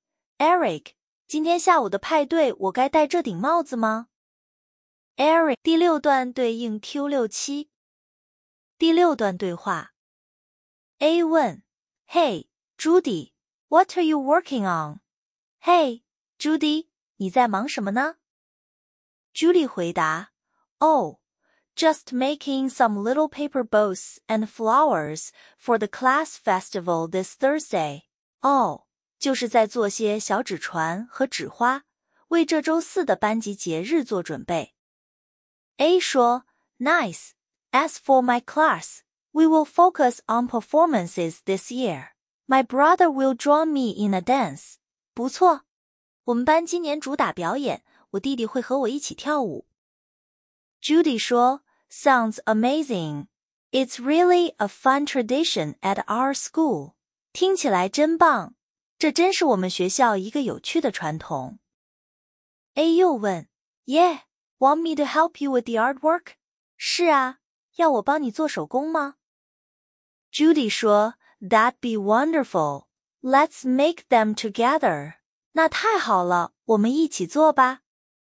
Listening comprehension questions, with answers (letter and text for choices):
第二节 听 5 段对话/独白,每段读两遍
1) What is Judy busy doing?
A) Painting pictures.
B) Making paper creations.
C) Preparing for a performance.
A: B) Making paper creations.

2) What is the relationship between the speakers?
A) School friends.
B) Brother and sister.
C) Teacher and student.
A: A) School friends.

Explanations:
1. paper boats and flowers = 纸艺;performance(C)是对方班级的活动。
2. 两人各属不同班级、同一所学校(my class / our school)→ 同学。"my brother" 是其中一人的弟弟,别误判两人是兄妹。

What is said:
A: Hey, Judy. What are you working on?
嘿,Judy,你在忙什么呢?
Judy: Oh, just making some little paper boats and flowers for the class festival this Thursday.
哦,就是在做些小纸船和纸花,为这周四的班级节日做准备。
A: Nice. As for my class, we will focus on performances this year. My brother will join me in a dance.
不错。我们班今年主打表演,我弟弟会和我一起跳舞。
Judy: Sounds amazing. It's really a fun tradition at our school.
听起来真棒。这真是我们学校一个有趣的传统。
A: Yeah. Want me to help you with the artwork?
是啊。要我帮你做手工吗?
Judy: That'd be wonderful. Let's make them together.
那太好了,我们一起做吧。
Q6. What is Judy busy doing? Judy 正忙着做什么? 答案 B
A. 做纸艺手工 C. 准备表演
抓分:paper boats and flowers = 纸艺;performance(C)是对方班级的活动。

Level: 高中